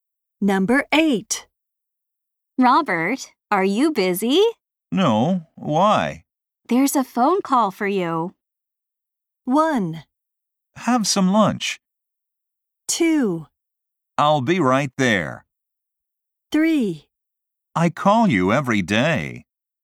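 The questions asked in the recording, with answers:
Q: There's a phone call for you.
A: 2: I'll be right there.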